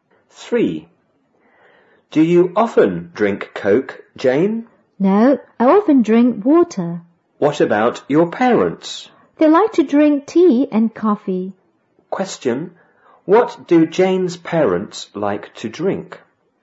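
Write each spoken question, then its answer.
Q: Question, what do Jane's parents like to drink?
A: Tea and coffee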